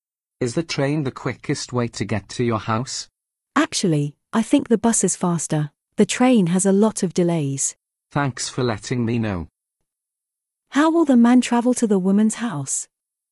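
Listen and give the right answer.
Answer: By bus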